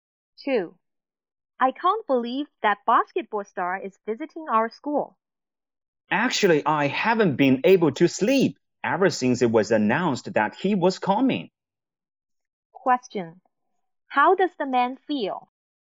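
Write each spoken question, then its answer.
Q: How does the man feel?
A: Very excited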